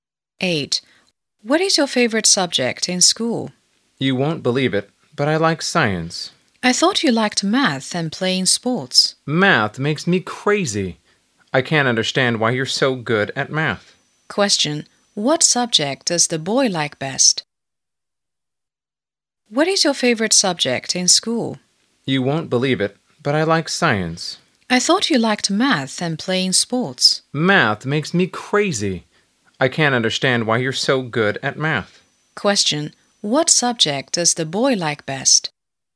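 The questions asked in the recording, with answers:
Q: What subject does the boy like best?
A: Science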